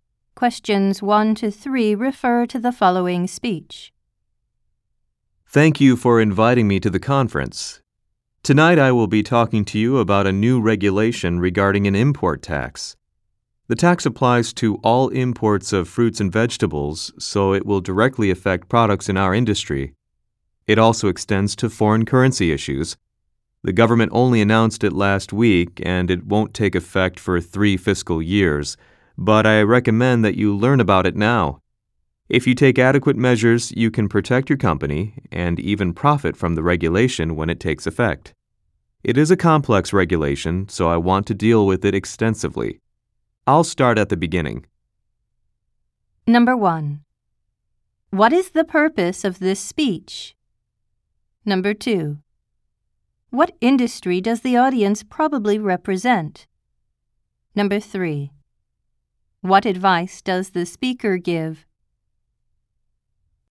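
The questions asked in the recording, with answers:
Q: What is the purpose of this speech?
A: To explain a new import tax regulation

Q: What industry does the audience probably represent?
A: The fruit and vegetable (produce) industry

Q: What advice does the speaker give?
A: Learn about the regulation now and take measures to prepare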